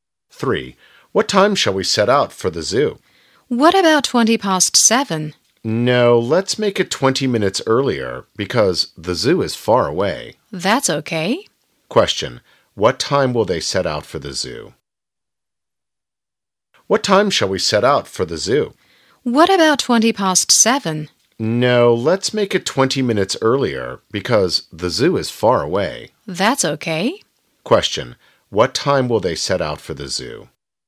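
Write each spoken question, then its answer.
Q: What time will they set out for the zoo?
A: At 7:00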